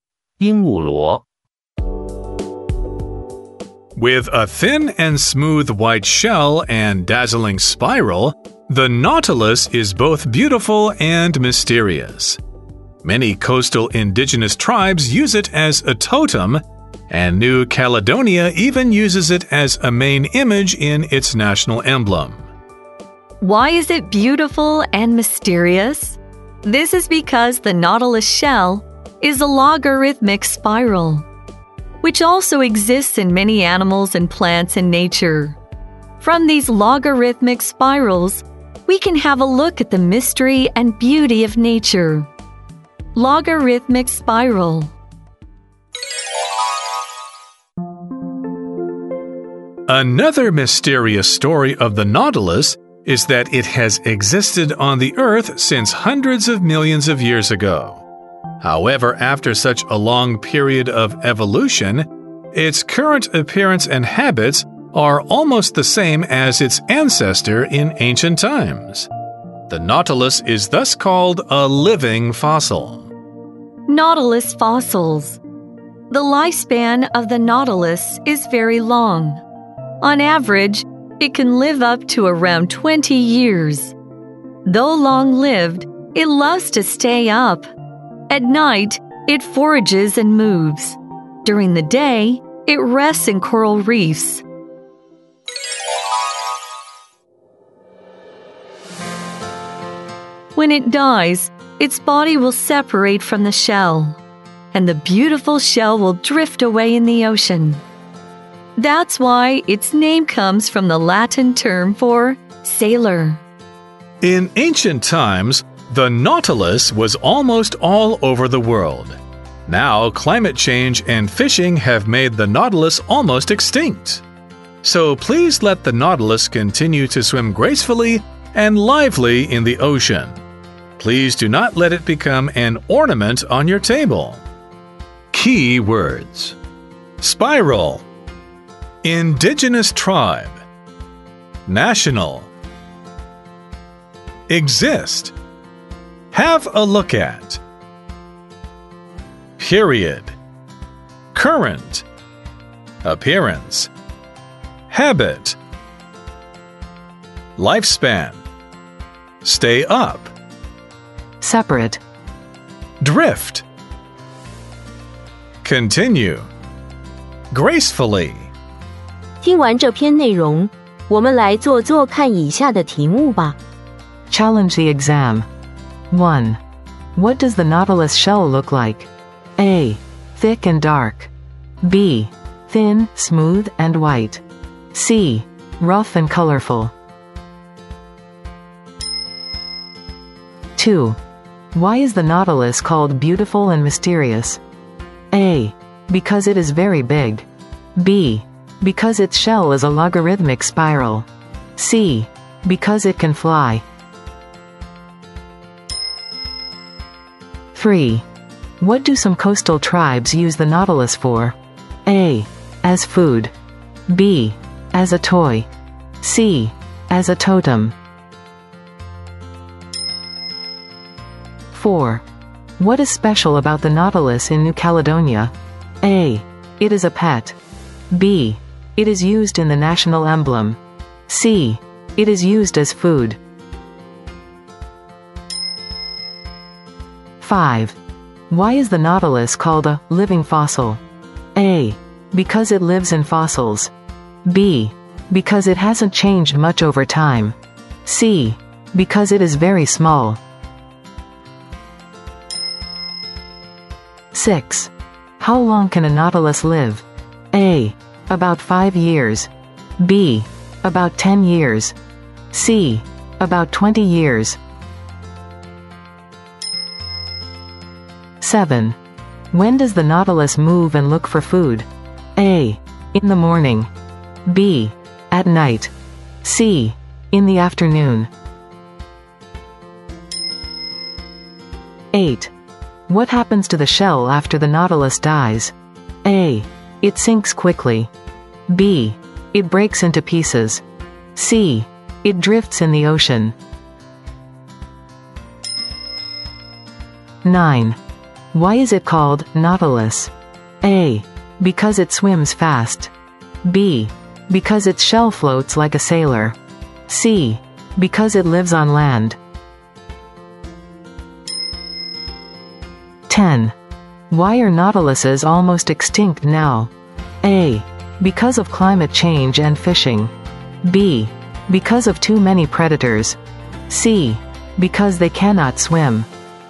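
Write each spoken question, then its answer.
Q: What does the Nautilus shell look like?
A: B: Thin, smooth, and white.

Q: Why is the Nautilus called beautiful and mysterious?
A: B: Because its shell is a logarithmic spiral.

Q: What do some coastal tribes use the Nautilus for?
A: C: As a totem.

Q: What is special about the Nautilus in New Caledonia?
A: B: It is used in the national emblem.

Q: Why is the Nautilus called a living fossil?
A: B: Because it hasn't changed much over time.

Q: How long can a Nautilus live?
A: C: About 20 years.

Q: When does the Nautilus move and look for food?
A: B: At night.

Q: What happens to the shell after the Nautilus dies?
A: C: It drifts in the ocean.

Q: Why is it called Nautilus?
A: B: Because its shell floats like a sailor.

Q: Why are Nautiluses almost extinct now?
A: A: Because of climate change and fishing.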